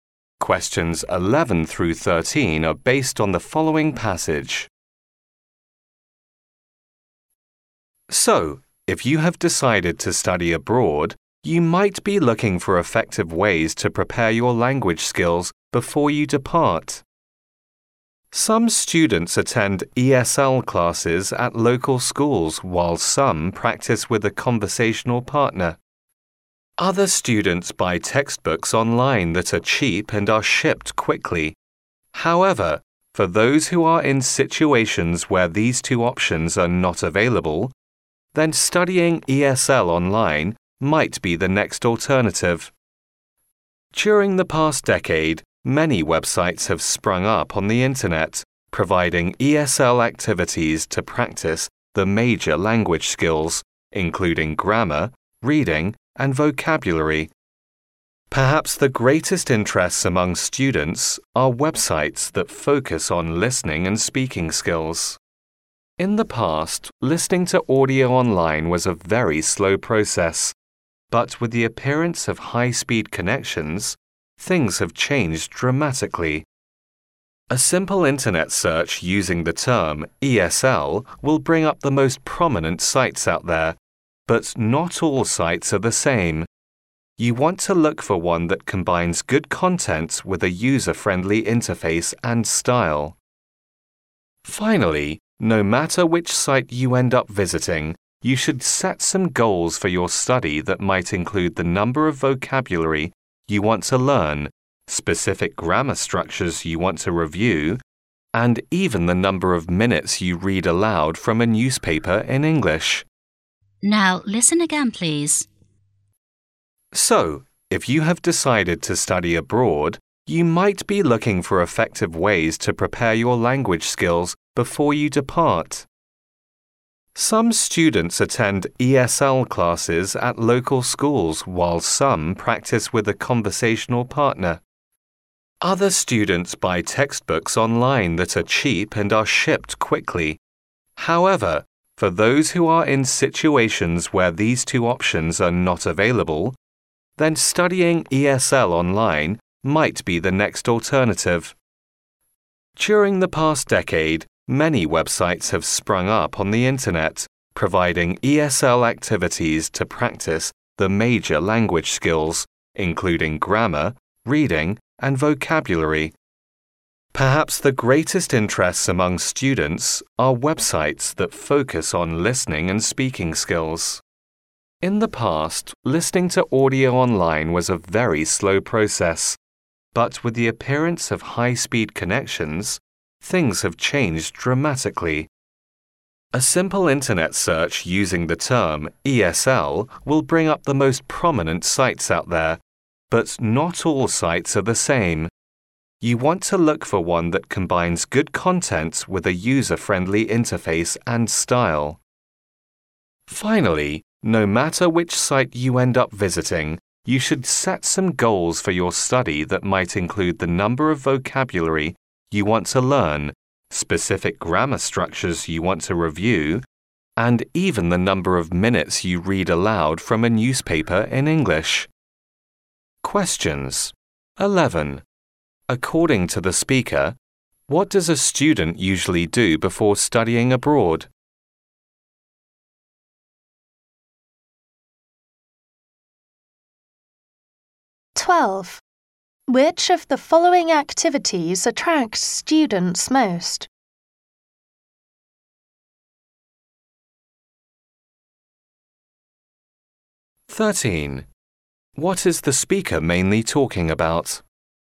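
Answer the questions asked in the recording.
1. Prepares their language skills
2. Websites for listening and speaking practice
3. Studying ESL online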